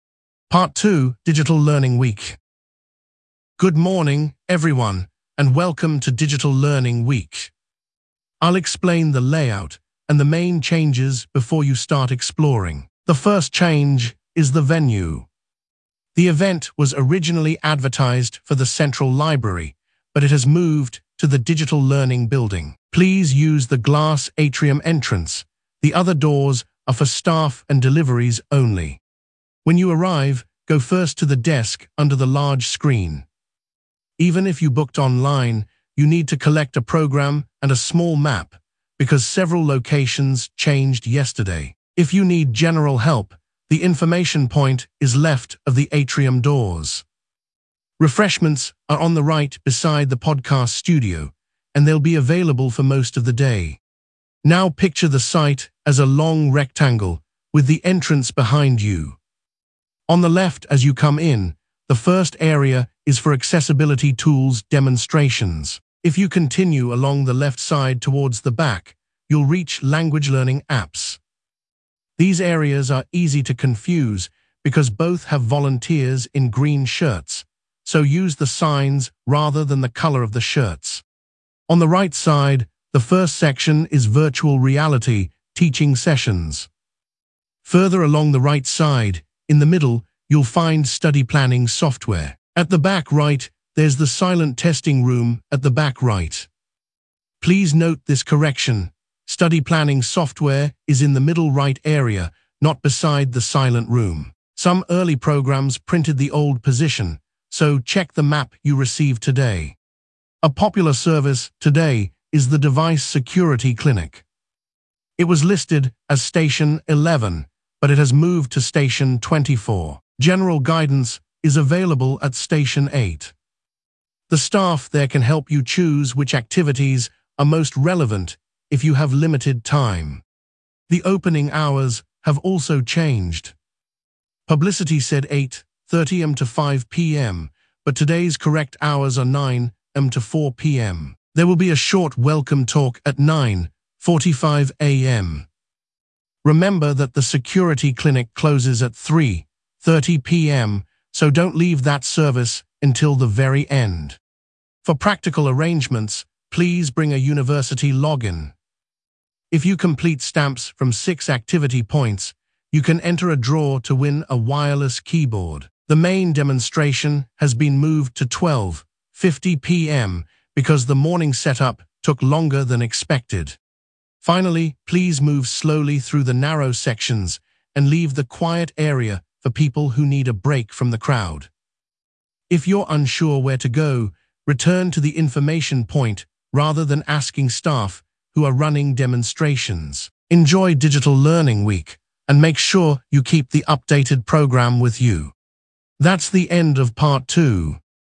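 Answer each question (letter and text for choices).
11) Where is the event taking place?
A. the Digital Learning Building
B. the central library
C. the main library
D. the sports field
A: A. the Digital Learning Building

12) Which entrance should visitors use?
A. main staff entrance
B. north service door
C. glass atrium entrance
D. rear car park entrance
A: C. glass atrium entrance

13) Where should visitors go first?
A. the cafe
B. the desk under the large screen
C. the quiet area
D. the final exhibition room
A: B. the desk under the large screen

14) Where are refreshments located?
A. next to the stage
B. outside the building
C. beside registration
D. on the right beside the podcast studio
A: D. on the right beside the podcast studio

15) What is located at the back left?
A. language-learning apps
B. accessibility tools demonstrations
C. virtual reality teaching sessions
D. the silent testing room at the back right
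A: A. language-learning apps

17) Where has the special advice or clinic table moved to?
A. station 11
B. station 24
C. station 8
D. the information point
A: B. station 24

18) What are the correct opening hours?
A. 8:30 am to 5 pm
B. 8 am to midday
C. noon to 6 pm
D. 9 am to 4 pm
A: D. 9 am to 4 pm

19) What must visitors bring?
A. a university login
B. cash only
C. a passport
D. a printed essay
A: A. a university login

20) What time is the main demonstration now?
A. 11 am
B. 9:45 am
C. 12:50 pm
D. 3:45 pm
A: C. 12:50 pm

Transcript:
Part 2: Digital Learning Week
Coordinator: Good morning, everyone, and welcome to Digital Learning Week. I will explain the layout and the main changes before you start exploring. The first change is the venue. The event was originally advertised for the central library, but it has moved to the Digital Learning Building. Please use the glass atrium entrance; the other doors are for staff and deliveries only.
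Coordinator: When you arrive, go first to the desk under the large screen. Even if you booked online, you need to collect a programme and a small map, because several locations changed yesterday. If you need general help, the information point is left of the atrium doors. Refreshments are on the right beside the podcast studio, and they will be available for most of the day.
Coordinator: Now picture the site as a long rectangle, with the entrance behind you. On the left as you come in, the first area is for accessibility tools demonstrations. If you continue along the left side towards the back, you will reach language-learning apps. These areas are easy to confuse because both have volunteers in green shirts, so use the signs rather than the colour of the shirts.
Coordinator: On the right side, the first section is virtual reality teaching sessions. Further along the right side, in the middle, you will find study-planning software. 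At the back right there is the silent testing room at the back right. Please note this correction: study-planning software is in the middle right area, not beside the silent room. Some early programmes printed the old position, so check the map you receive today.
Coordinator: A popular service today is the device security clinic. It was listed as station 11, but it has moved to station 24. General guidance is available at station 8. The staff there can help you choose which activities are most relevant if you have limited time.
Coordinator: The opening hours have also changed. Publicity said 8:30 am to 5 pm, but today's correct hours are 9 am to 4 pm. There will be a short welcome talk at 9:45 am. Remember that the security clinic closes at 3:30 pm, so do not leave that service until the very end.
Coordinator: For practical arrangements, please bring a university login. If you complete stamps from six activity points, you can enter a draw to win a wireless keyboard. 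The main demonstration has been moved to 12:50 pm because the morning setup took longer than expected.
Coordinator: Finally, please move slowly through the narrow sections and leave the quiet area for people who need a break from the crowd. If you are unsure where to go, return to the information point rather than asking staff who are running demonstrations. Enjoy Digital Learning Week, and make sure you keep the updated programme with you.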